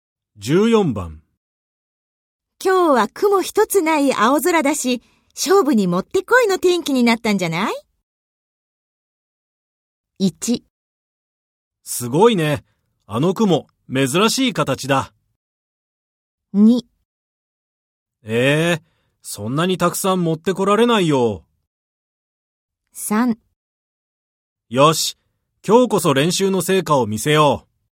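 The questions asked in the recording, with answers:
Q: 今日は雲一つない青空だし、勝負にもってこいの天気になったんじゃない?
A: 3: よし、今日こそ練習の成果を見せよう。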